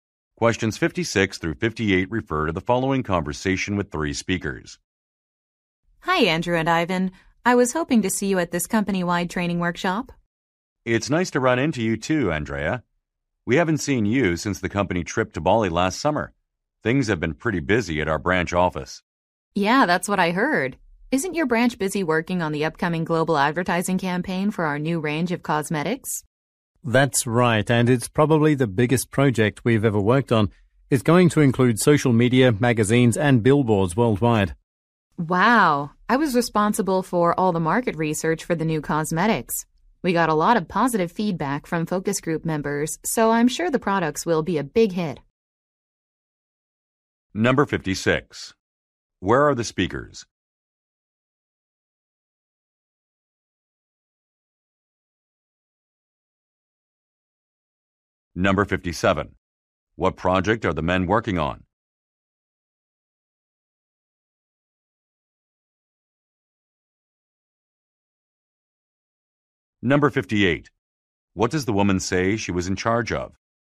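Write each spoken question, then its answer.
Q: Where are the speakers?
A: At a company-wide training workshop

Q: What project are the men working on?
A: A global advertising campaign for new cosmetics

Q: What does the woman say she was in charge of?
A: Market research for the new cosmetics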